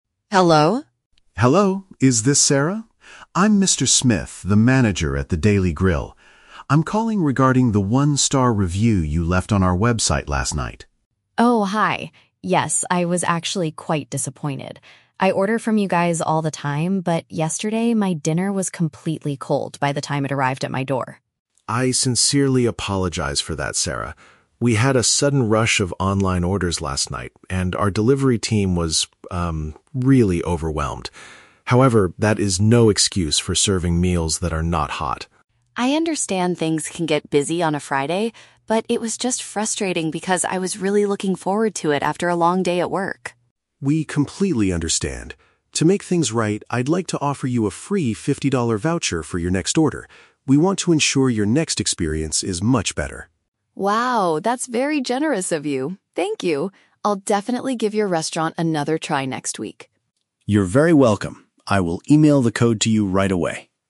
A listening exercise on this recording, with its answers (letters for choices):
Listen to a phone conversation between a restaurant manager and a customer. Choose the correct answer (A, B, or C).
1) Why did the manager call the customer?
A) To respond to her negative feedback online.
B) To complain about her recent food order.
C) To inform her about a new dinner menu.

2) What was the main reason for the customer's bad experience?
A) The delivery drivers were extremely rude to her.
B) The restaurant cooked the wrong dishes for her.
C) The food she received had lost all of its heat.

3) How does the manager try to solve the problem?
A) By sending a fresh hot meal to her house right away.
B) By returning the fifty dollars she paid yesterday.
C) By providing a discount code for her future purchase.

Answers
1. A
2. C
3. C

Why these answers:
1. The manager states he is calling regarding the "one-star review you left on our website". A one-star review is a B1 paraphrase for "negative feedback online." The Trap: Option (B) uses words from the audio ("order", "complain"), but the manager is calling to apologize, not to complain to the customer. Option (C) is a plausible reason for a restaurant to call a customer, but it is not mentioned here.
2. Sarah explains that her dinner was "completely cold by the time it arrived." "Lost all of its heat" is a synonym for being completely cold. The Trap: Option (A) is a trap. The manager mentions the "delivery team," but he says they were "overwhelmed" (too busy), not rude. Option (B) is a common food delivery issue but is never mentioned in the audio.
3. Mr. Smith offers her a "free fifty-dollar voucher for your next order." A voucher for a next order means a discount code for a future purchase. The Trap: Option (B) is a trap. The audio mentions "fifty-dollar," but he is giving her a voucher for her next order, not refunding (returning) the money she spent yesterday. Option (A) is a logical real-world solution to cold food, but he does not offer to send food right away; he sends a code via email.

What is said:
Sarah: Hello?
Mr. Smith: Hello, is this Sarah? I'm Mr. Smith, the manager at The Daily Grill. I'm calling regarding the one-star review you left on our website last night.
Sarah: Oh, hi. Yes, I was actually quite disappointed. I order from you guys all the time, but yesterday my dinner was completely cold by the time it arrived at my door.
Mr. Smith: I sincerely apologize for that, Sarah. We had a sudden rush of online orders last night, and our delivery team was, um, really overwhelmed. However, that is no excuse for serving meals that are not hot.
Sarah: I understand things can get busy on a Friday, but it was just frustrating because I was really looking forward to it after a long day at work.
Mr. Smith: We completely understand. To make things right, I'd like to offer you a free fifty-dollar voucher for your next order. We want to ensure your next experience is much better.
Sarah: Wow, that's very generous of you. Thank you. I'll definitely give your restaurant another try next week.